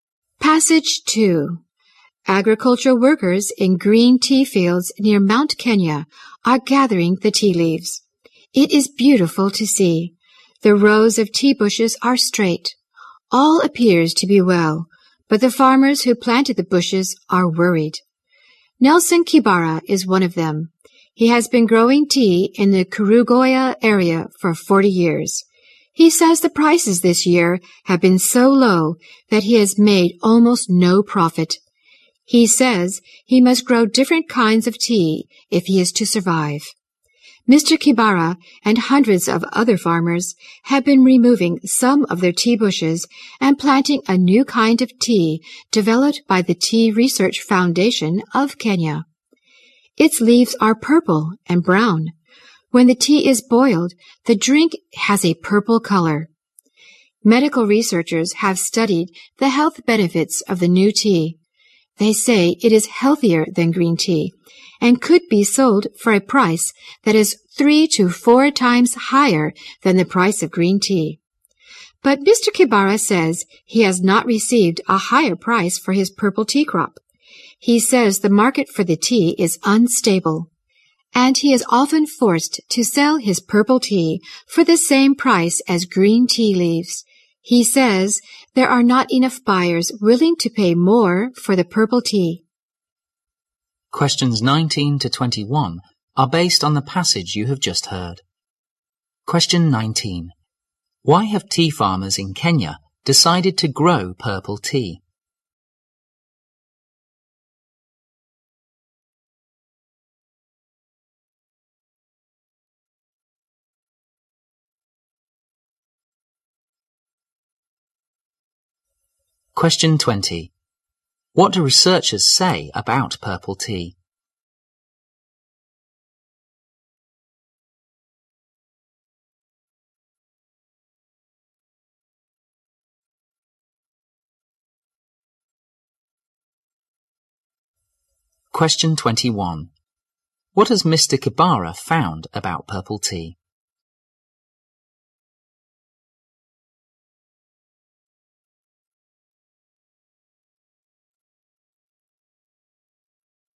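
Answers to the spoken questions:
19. Green tea prices were too low to make a profit
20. It is healthier than green tea and could sell for 3 to 4 times the price
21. Its market is unstable; he often sells it at green tea prices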